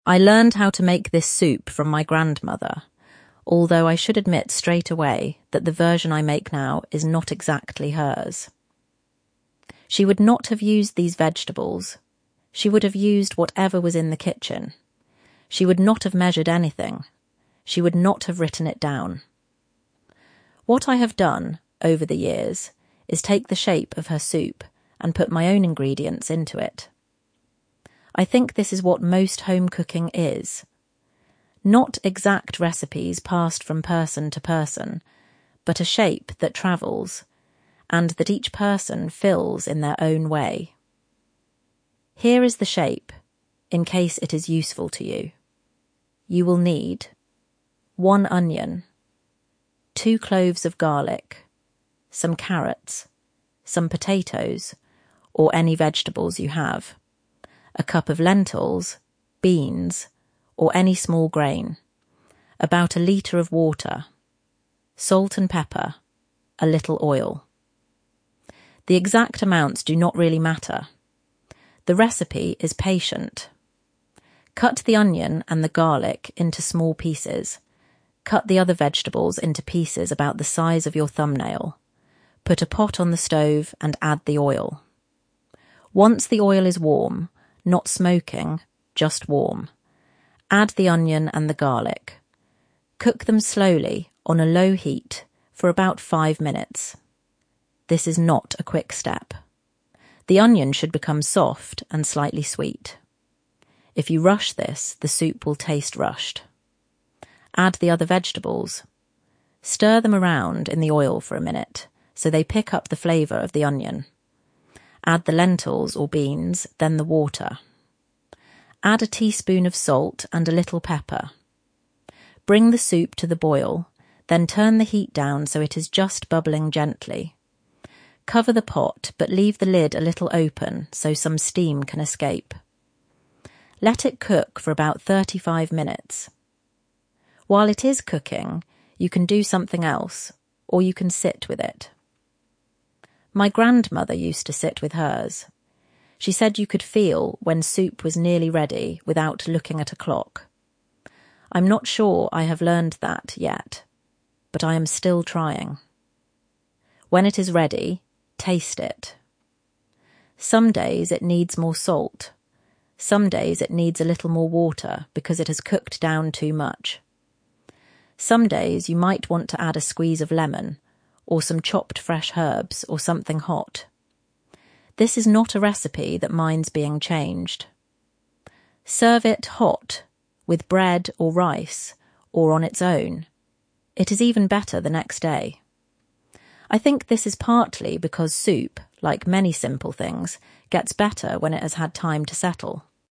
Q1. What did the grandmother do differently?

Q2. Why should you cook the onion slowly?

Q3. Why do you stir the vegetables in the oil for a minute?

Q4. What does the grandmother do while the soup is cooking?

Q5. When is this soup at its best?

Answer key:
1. She didn't measure anything.
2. So that the onion becomes soft and slightly sweet.
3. So they pick up the flavour of the onion.
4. She sits with it.
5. The next day

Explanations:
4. She used to say 'you could feel when soup was nearly ready without looking at a clock.'
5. because soup, like many simple things, 'gets better when it has had time to settle'.

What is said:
I learned how to make this soup from my grandmother, although I should admit straight away that the version I make now is not exactly hers. She would not have used these vegetables; she would have used whatever was in the kitchen. She would not have measured anything. She would not have written it down.
What I have done, over the years, is take the shape of her soup and put my own ingredients into it. I think this is what most home cooking is — not exact recipes passed from person to person, but a shape that travels, and that each person fills in their own way.
Here is the shape, in case it is useful to you.
You will need
one onion; two cloves of garlic; some carrots; some potatoes (or any vegetables you have); a cup of lentils, beans, or any small grain; about a litre of water; salt and pepper; a little oil. The exact amounts do not really matter. The recipe is patient.
Cut the onion and the garlic into small pieces. Cut the other vegetables into pieces about the size of your thumbnail.
Put a pot on the stove and add the oil. Once the oil is warm — not smoking, just warm — add the onion and the garlic. Cook them slowly, on a low heat, for about five minutes. This is not a quick step. The onion should become soft and slightly sweet. If you rush this, the soup will taste rushed.
Stir them around in the oil for a minute, so they pick up the flavour of the onion.
Add the lentils or beans, then the water. Add a teaspoon of salt and a little pepper. Bring the soup to the boil, then turn the heat down so it is just bubbling gently. Cover the pot, but leave the lid a little open so some steam can escape.
Let it cook for about thirty-five minutes. While it is cooking, you can do something else, or you can sit with it. My grandmother used to sit with hers. She said you could feel when soup was nearly ready without looking at a clock. I am not sure I have learned that yet, but I am still trying.
When it is ready, taste it. Some days it needs more salt. Some days it needs a little more water because it has cooked down too much. Some days you might want to add a squeeze of lemon, or some chopped fresh herbs, or something hot. This is not a recipe that minds being changed.
Serve it hot, with bread or rice, or on its own. It is even better the next day. I think this is partly because soup, like many simple things, gets better when it has had time to settle.